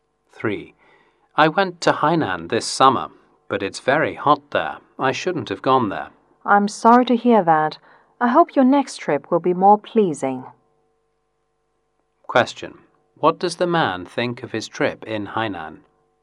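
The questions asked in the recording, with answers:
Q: What does the man think of his trip in Hainan?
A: He regrets going; it was too hot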